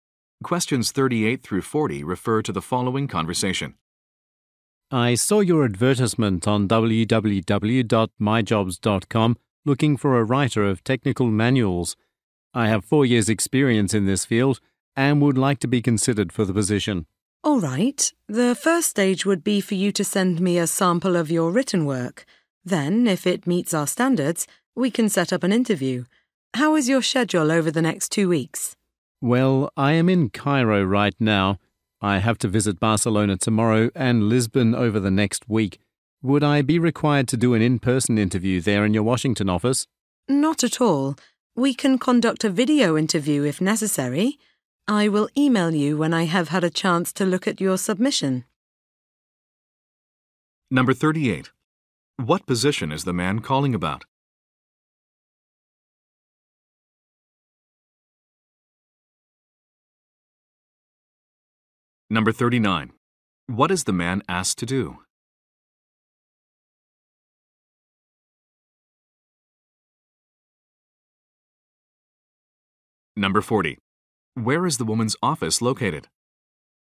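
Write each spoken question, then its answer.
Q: What position is the man calling about?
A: Writer of technical manuals

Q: What is the man asked to do?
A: Send a sample of his written work

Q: Where is the woman's office located?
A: Washington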